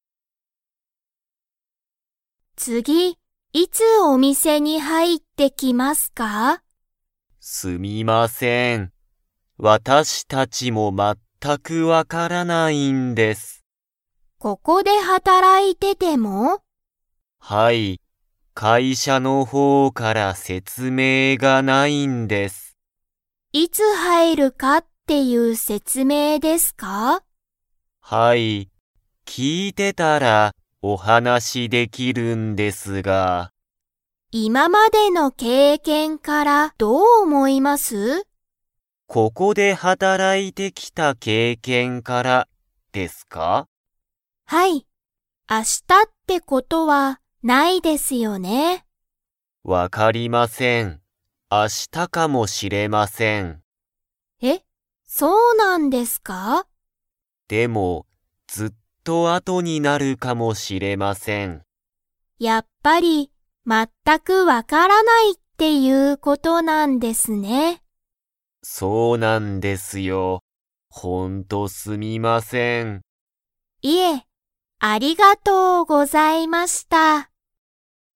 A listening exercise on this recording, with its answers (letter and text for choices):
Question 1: 店員てんいんは、____わからない、と言(い)った。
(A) どこにも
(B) 次(つぎ)にいつ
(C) ここで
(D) 全(まった)く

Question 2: 会社(かいしゃ)の方(ほう)から説明(せつめい)はありますか?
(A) はい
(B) いいえ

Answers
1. (D) 全(まった)く
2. (B) いいえ

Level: Level 2